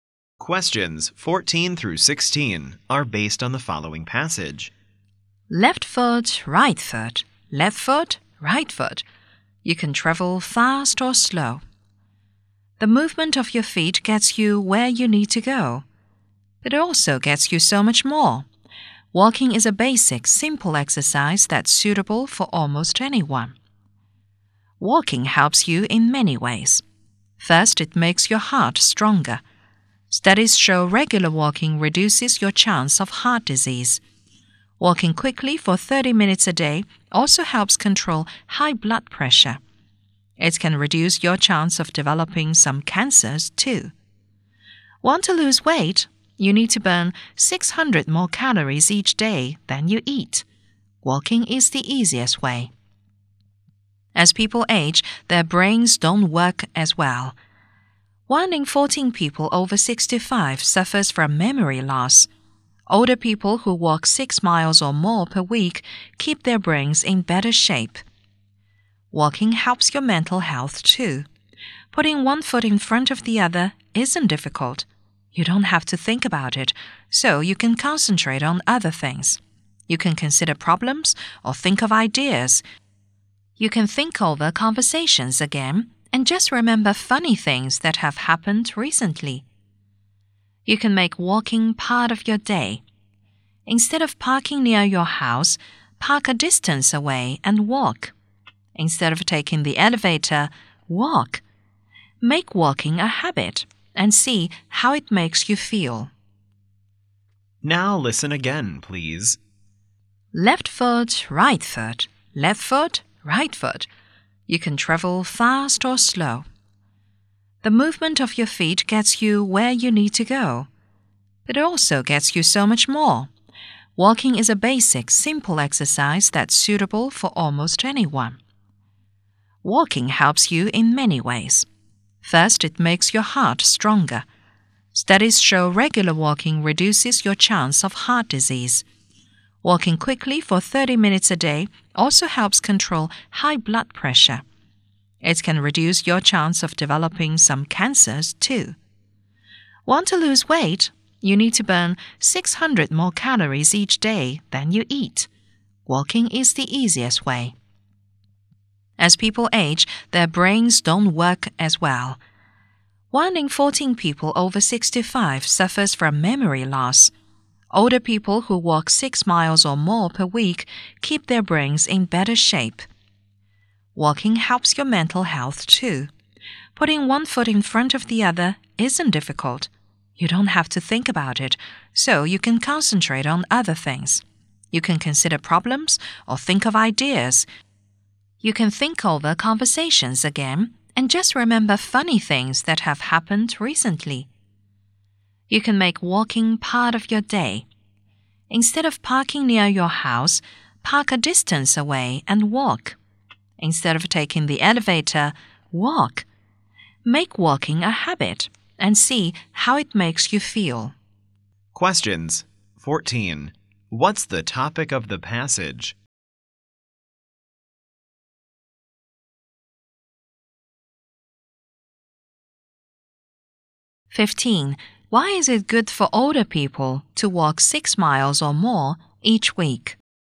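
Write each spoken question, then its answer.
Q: What's the topic of the passage?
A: The benefits of walking

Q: Why is it good for older people to walk 6 miles or more each week?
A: It keeps their brains in better shape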